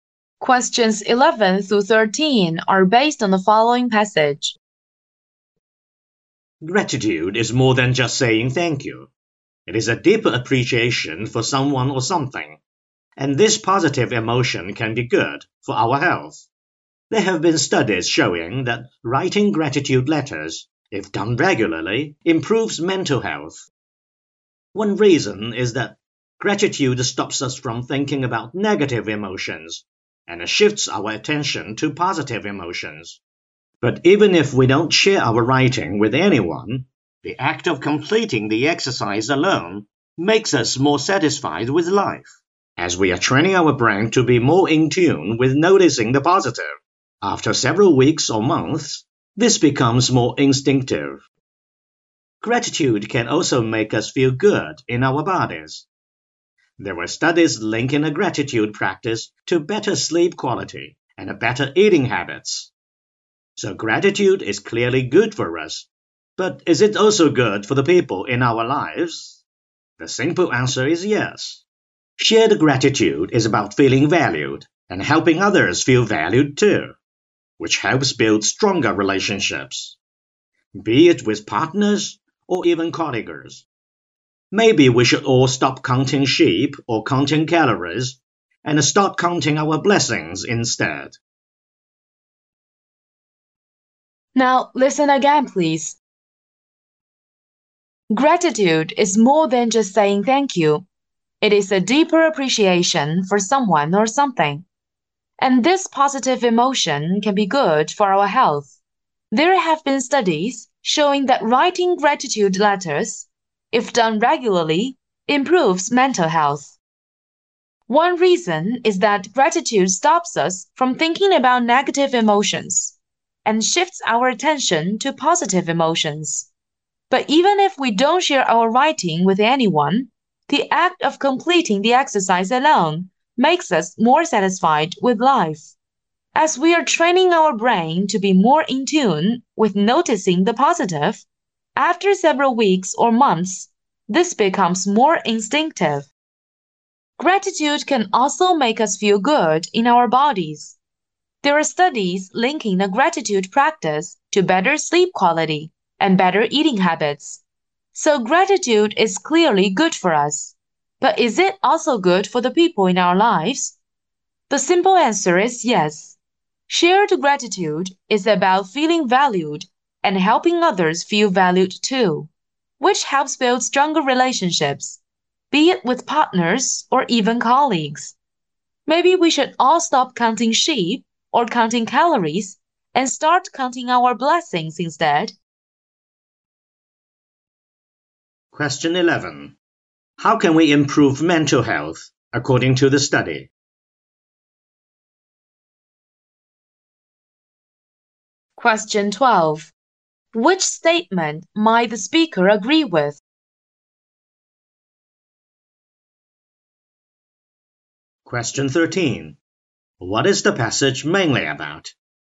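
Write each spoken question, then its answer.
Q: How can we improve mental health according to the study?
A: By writing gratitude letters regularly

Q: What is the passage mainly about?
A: The benefits of gratitude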